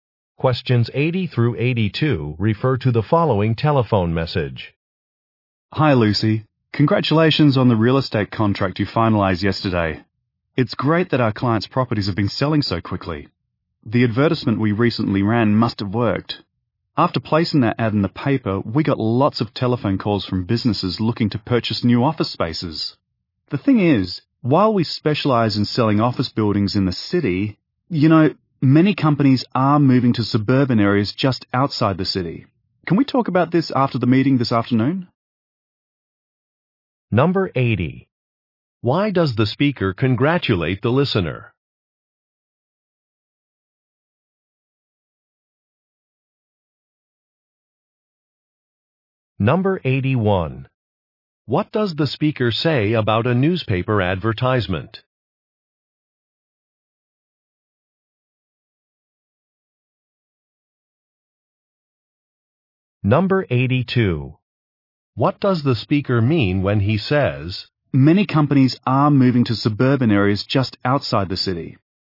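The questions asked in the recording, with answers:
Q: Why does the speaker congratulate the listener?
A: She finalized a real estate contract

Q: What does the speaker say about a newspaper advertisement?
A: It brought many calls from businesses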